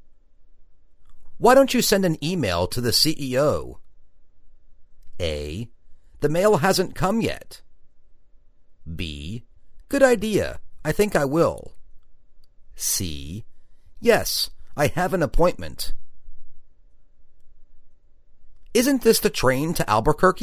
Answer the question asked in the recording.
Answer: Good idea. I think I will.